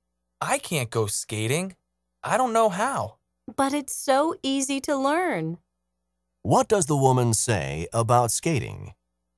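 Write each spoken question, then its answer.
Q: What does the woman say about skating?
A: It's easy to learn.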